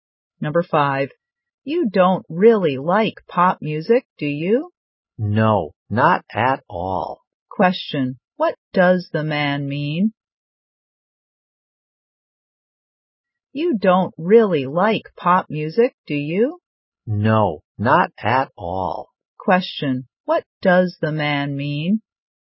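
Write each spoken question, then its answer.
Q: What does the man mean?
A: He doesn't like pop music at all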